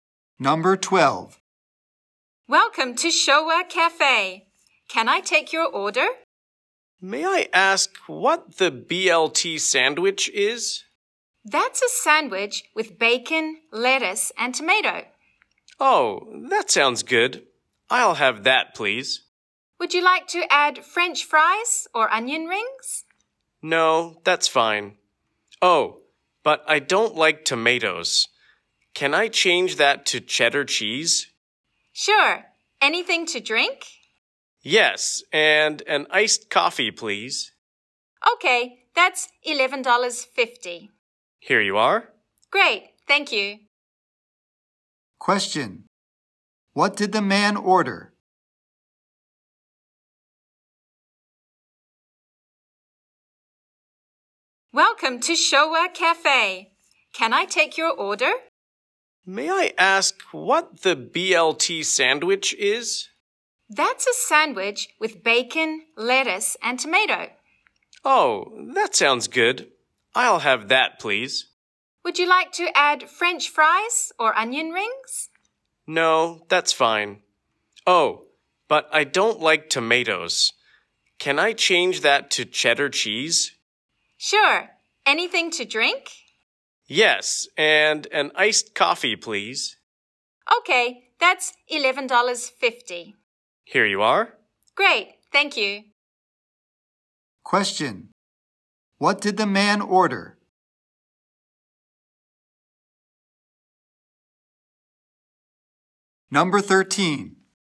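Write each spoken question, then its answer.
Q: What did the man order?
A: A BLT sandwich with cheddar cheese instead of tomato, and an iced coffee.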